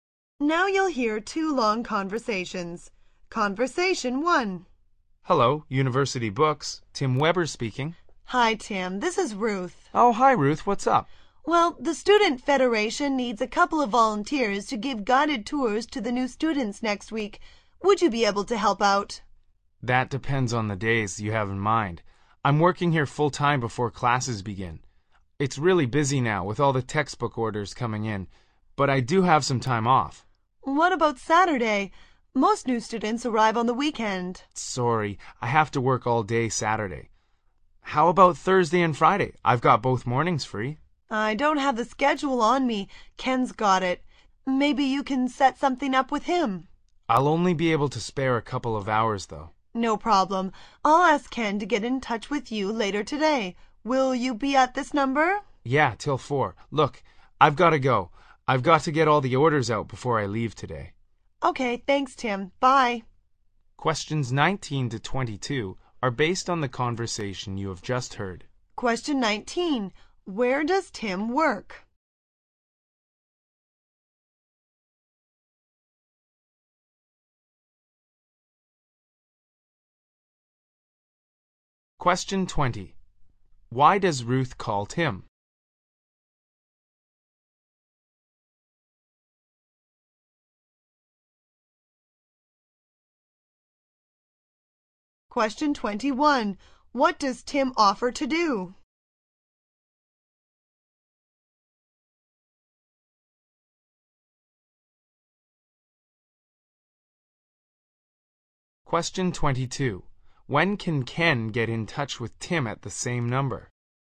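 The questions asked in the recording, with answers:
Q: Where does Tim work?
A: At University Books, a bookstore

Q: Why does Ruth call Tim?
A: To ask him to volunteer to give guided tours to new students

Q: What does Tim offer to do?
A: Help for a couple of hours on Thursday and Friday mornings

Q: When can Ken get in touch with Tim at the same number?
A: Until 4 o'clock today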